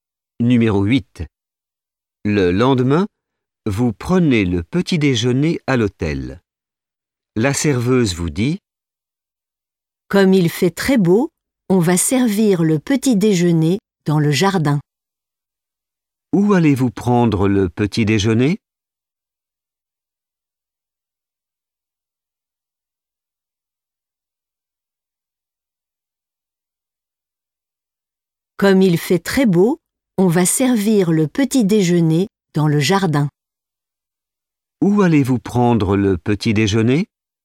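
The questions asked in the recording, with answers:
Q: Où allez-vous prendre le petit déjeuner?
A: dans le jardin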